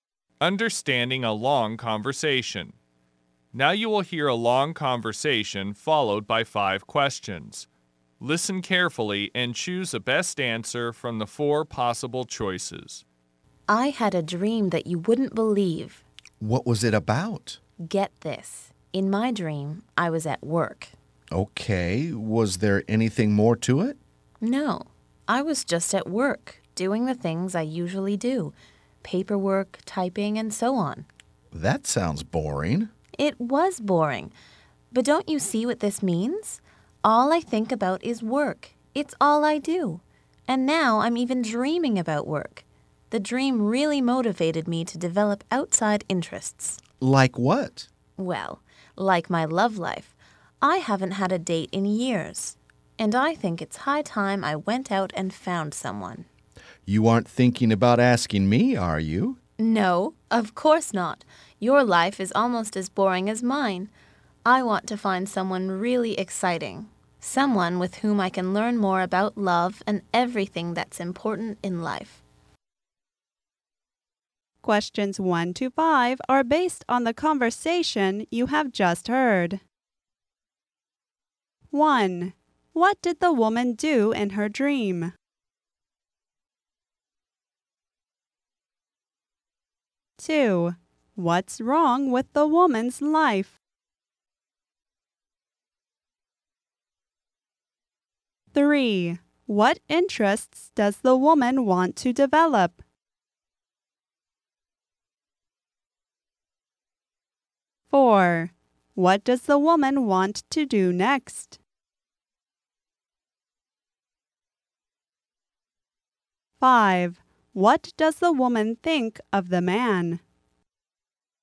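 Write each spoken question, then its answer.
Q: What did the woman do in her dream?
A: She was at work doing her usual things, like paperwork and typing

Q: What's wrong with the woman's life?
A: All she thinks about and does is work; it's boring

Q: What interests does the woman want to develop?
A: Her love life

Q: What does the woman want to do next?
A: Go out and find someone exciting to date

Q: What does the woman think of the man?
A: His life is almost as boring as hers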